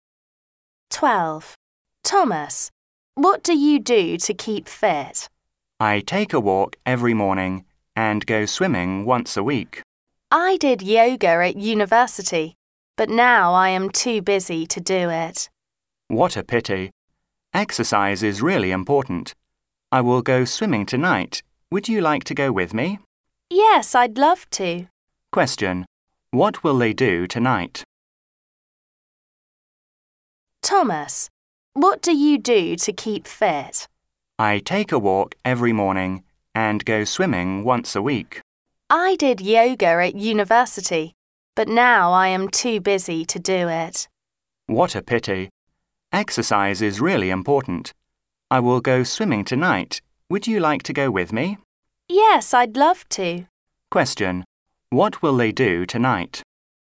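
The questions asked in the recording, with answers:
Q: Question: What will they do tonight?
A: Go swimming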